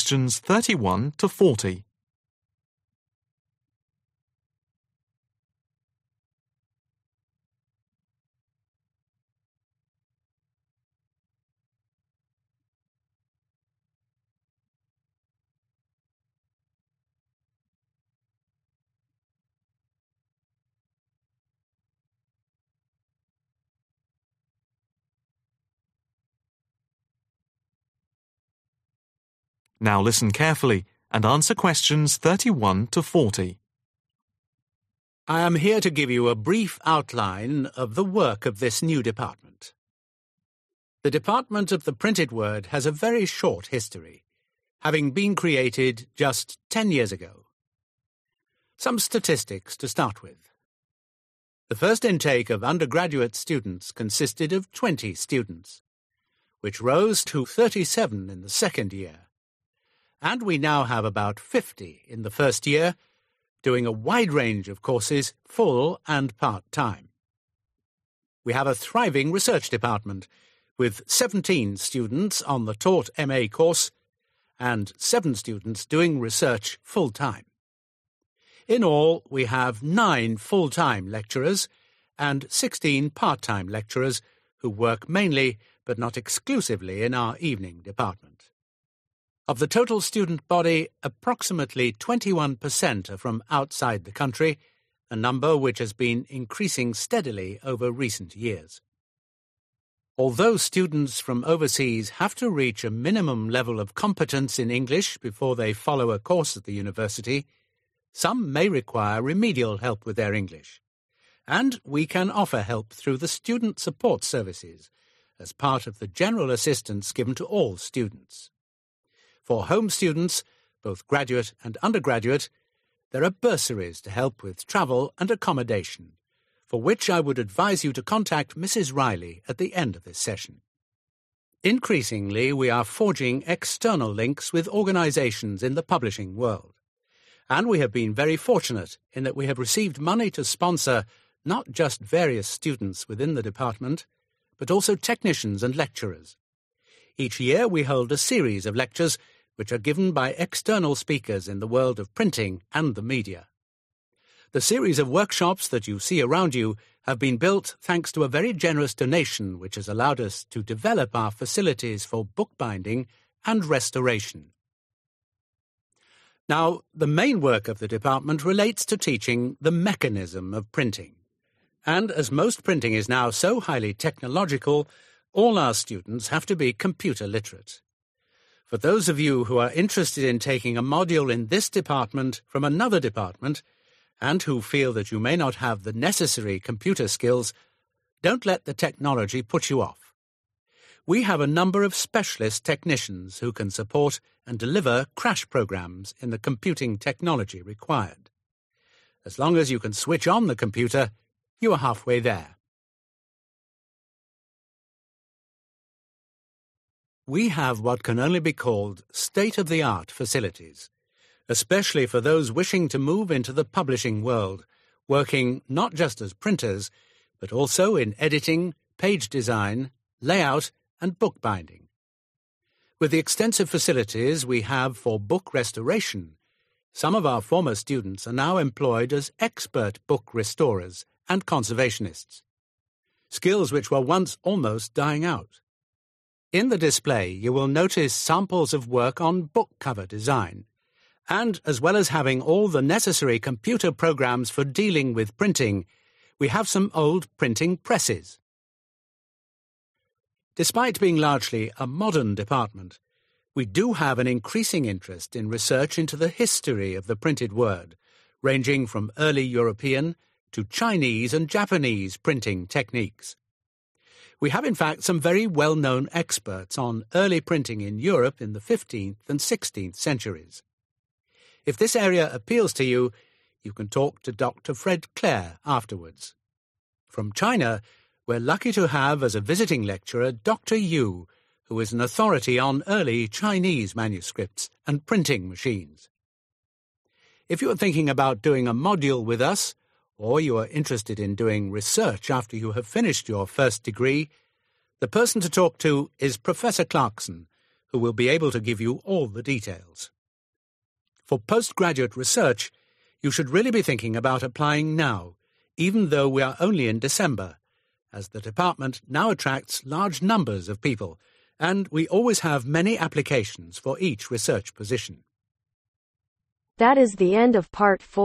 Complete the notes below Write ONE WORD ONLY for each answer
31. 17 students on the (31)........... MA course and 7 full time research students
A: Taught

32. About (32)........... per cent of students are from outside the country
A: 21

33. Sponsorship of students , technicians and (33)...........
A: Lecturers

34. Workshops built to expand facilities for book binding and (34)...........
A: Restoration

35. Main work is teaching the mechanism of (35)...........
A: Printing

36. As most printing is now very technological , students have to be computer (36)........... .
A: Literate

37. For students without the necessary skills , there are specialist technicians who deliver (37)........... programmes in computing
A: Crash

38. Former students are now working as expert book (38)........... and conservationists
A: Restorers

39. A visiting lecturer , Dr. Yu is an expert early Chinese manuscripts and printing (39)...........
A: Machines

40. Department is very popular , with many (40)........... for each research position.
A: Applications